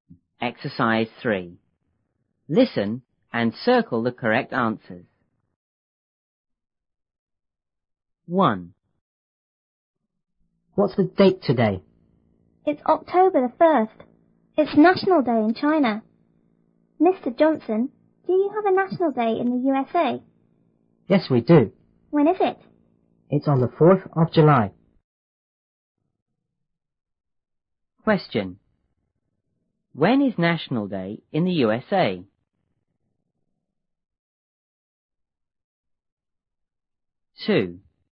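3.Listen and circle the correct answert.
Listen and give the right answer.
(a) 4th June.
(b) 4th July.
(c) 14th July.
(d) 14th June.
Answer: (b) 4th July.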